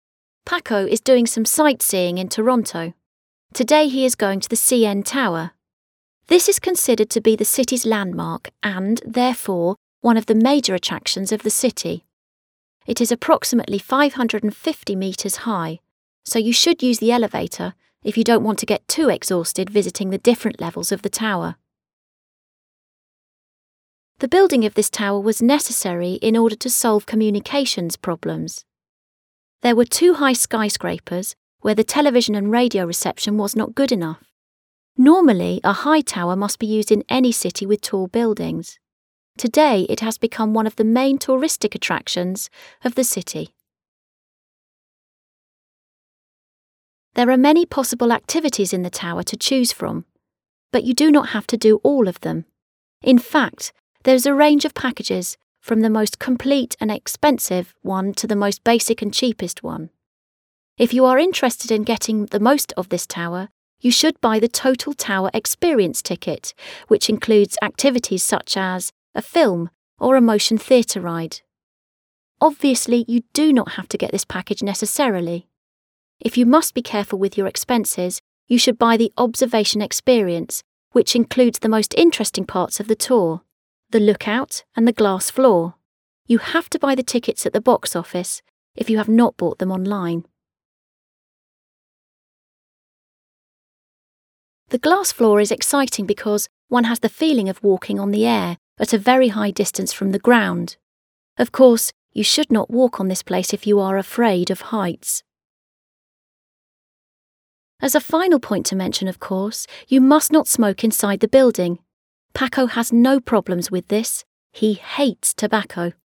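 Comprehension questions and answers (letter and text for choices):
Read the text again and decide if the following statements are true or false:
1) The CN Tower is representative of Toronto.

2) The CN Tower is only used for tourists.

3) The only attraction of the Tower is the view at a high distance.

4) The Glass Floor is a big attraction.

Choose the correct ending for each sentence according to the text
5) To visit the CN Tower you ...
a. ought to take the elevator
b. needn't take the elevator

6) This tower was built ...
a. to improve communications in high buildings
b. to serve as a tourist attraction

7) If you want to have access to all the activities in the Tower ...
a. you have to buy the Observation Experience ticket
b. you have to buy the Total Tower Experience ticket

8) To live the astonishing experience of "walking on air" , you should visit ...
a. The Look Out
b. the Glass Floor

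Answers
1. Verdadero
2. Falso
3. Falso
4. Verdadero
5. a. ought to take the elevator
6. a. to improve communications in high buildings
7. b. you have to buy the Total Tower Experience ticket
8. b. the Glass Floor

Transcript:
Paco is doing some sightseeing in Toronto. Today he is going to the CN Tower. This is considered to be the city's landmark and, therefore, one of the major attractions of the city. It is approximately 550 metres high so you should use the elevator if you do not want to get exhausted visiting the different levels of the tower.
The building of this tower was necessary in order to solve communication problems. There were too high skyscrapers where the television and radio reception was not good enough. Normally, a high tower must be used in any city with tall buildings. Today it has become one of the main tourist attractions of the city.
There are many possible activities in the tower to choose from but you do not have to do all of them. 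In fact, there is a range of packages from the most complete and expensive one to the most basic and cheapest one. If you are interested in getting the most of this tower, you should buy the Total Tower Experience ticket, which includes activities such as a film or a motion theatre ride. Obviously, you do not have to get this package necessarily. If you must be careful with your expenses, you should buy the Observation Experience, which includes the most interesting parts of the tour: the Look Out, and the Glass Floor. You have to buy the tickets at the box office if you have not bought them online.
The Glass Floor is exciting because one has the feeling of walking on the air at a very high distance from the ground. Of course, you should not walk on this place if you are afraid of heights!
As a final point to mention, of course, you must not smoke inside the building. Paco has no problems with this: he hates tobacco!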